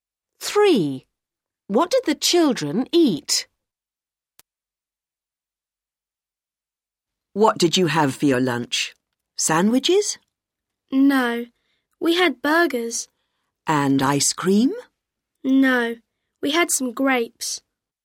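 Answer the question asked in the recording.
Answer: burgers and grapes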